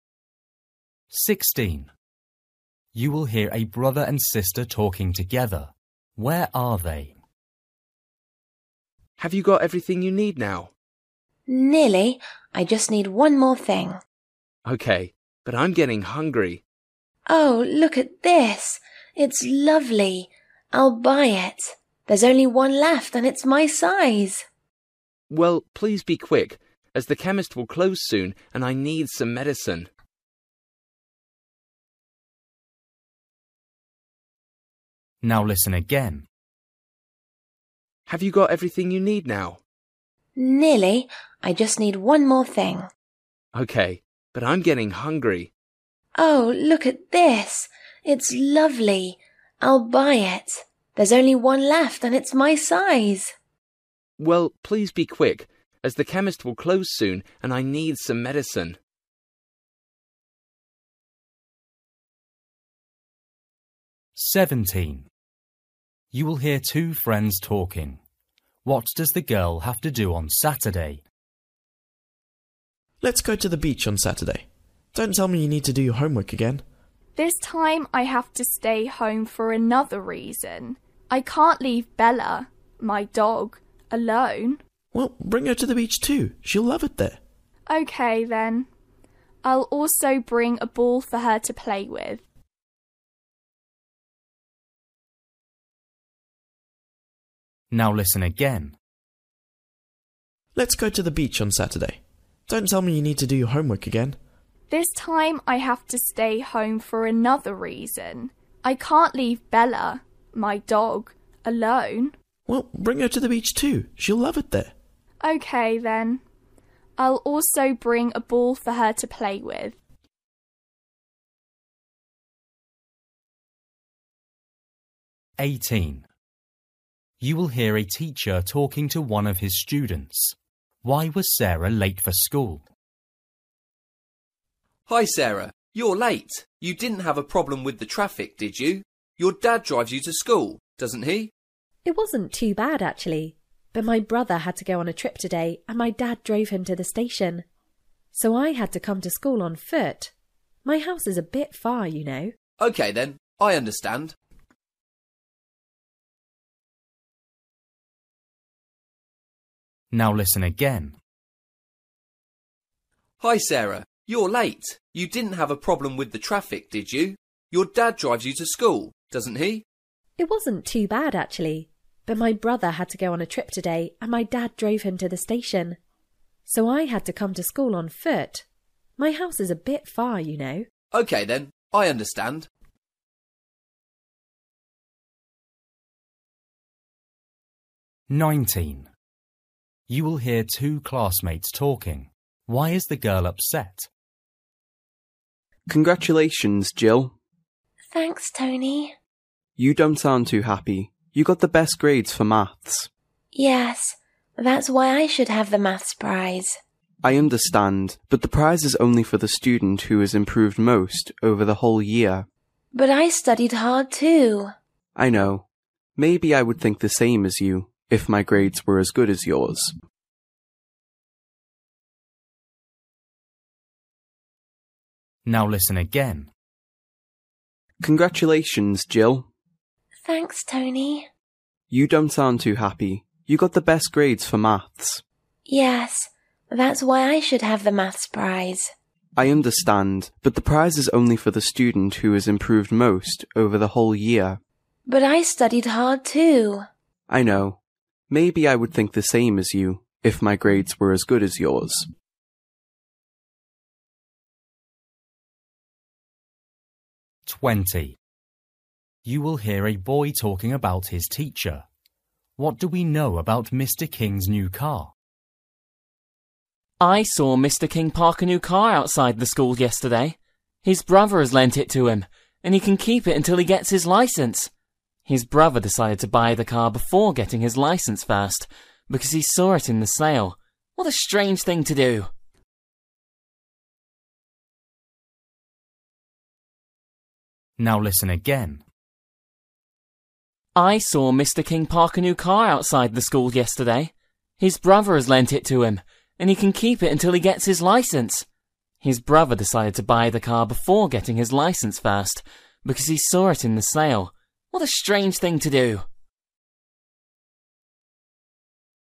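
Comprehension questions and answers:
For each question, choose the correct answer.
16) You will hear a brother and sister talking together. Where are they?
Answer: In a clothes shop

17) You will hear two friends talking. What does the girl have to do on Saturday?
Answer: Look after her dog, Bella

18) You will hear a teacher talking to one of his students. Why was Sarah late at school?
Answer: She had to walk because her dad drove her brother to the station

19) You will hear two classmates talking. Why is the girl upset?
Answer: She didn't get the maths prize

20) You will hear a boy talking about his teacher. What do we know about Mr. King's new car?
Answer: It belongs to his brother, who lent it to him

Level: Luyện nghe trình độ A2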